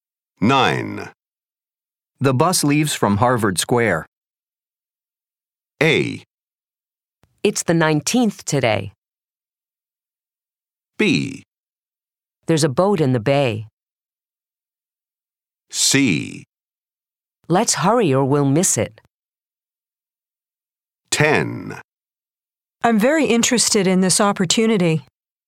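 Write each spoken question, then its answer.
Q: The bus leaves from Harvard Square.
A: C: Let's hurry or we'll miss it.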